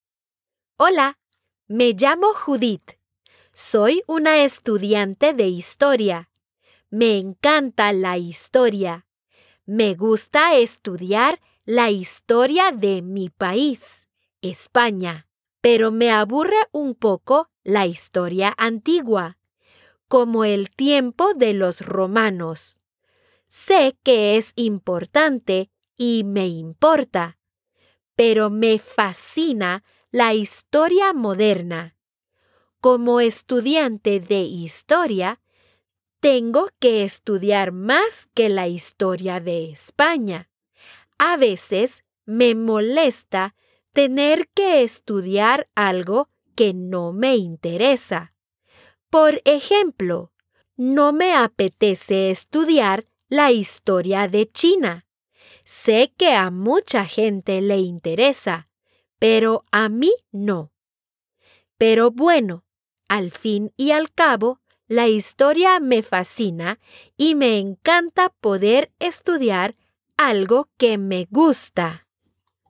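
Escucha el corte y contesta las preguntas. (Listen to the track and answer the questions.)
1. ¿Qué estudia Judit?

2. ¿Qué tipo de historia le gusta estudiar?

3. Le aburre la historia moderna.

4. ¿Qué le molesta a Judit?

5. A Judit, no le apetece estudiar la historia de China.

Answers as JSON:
{"1": "Historia", "2": "La historia de su país, España, y la historia moderna", "3": "Falso", "4": "Tener que estudiar algo que no le interesa", "5": "Cierto"}

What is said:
Hola, me llamo Judit. Soy una estudiante de historia. Me encanta la historia. Me gusta estudiar la historia de mi país – España. Pero me aburre un poco la historia antigua, como el tiempo de los romanos. Sé que es importante, y me importa. Pero me fascina la historia moderna. Como estudiante de historia, tengo que estudiar más que la historia de España. A veces, me molesta tener que estudiar algo que no me interesa. Por ejemplo, no me apetece estudiar la historia de China. 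Sé que a mucha gente le interesa, pero a mí no. Pero, bueno... al fin y al cabo, la historia me fascina y me encanta poder estudiar algo que me gusta.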